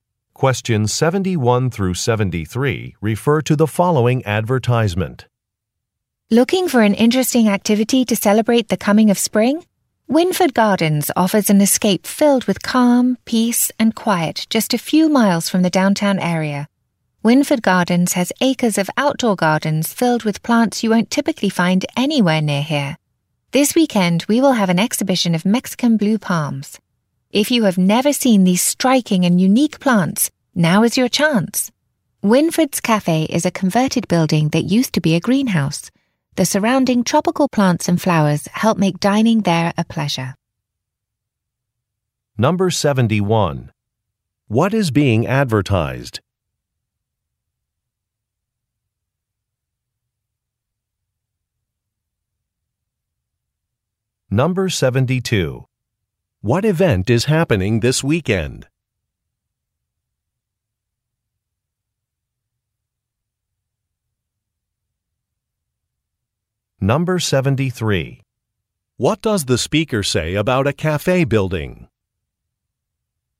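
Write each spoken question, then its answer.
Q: What is being advertised?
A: Wynford Gardens, a garden attraction

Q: What event is happening this weekend?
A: An exhibition of Mexican blue palms

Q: What does the speaker say about a cafe building?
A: It used to be a greenhouse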